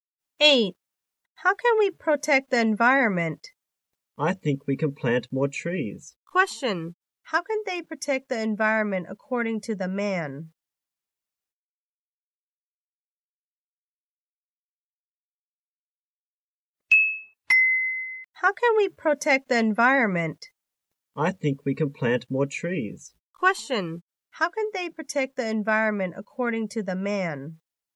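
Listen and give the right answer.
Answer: By planting more trees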